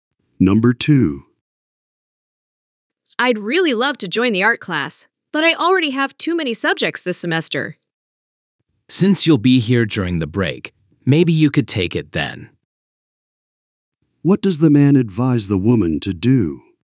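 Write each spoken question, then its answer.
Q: What does the man advise the woman to do?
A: Take the art class during the break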